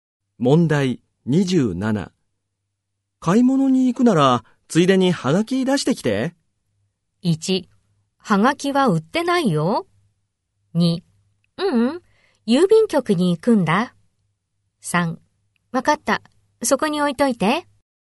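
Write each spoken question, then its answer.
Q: 買い物に行くならついでにハガキ出してきて。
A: 3: わかった、そこに置いといて。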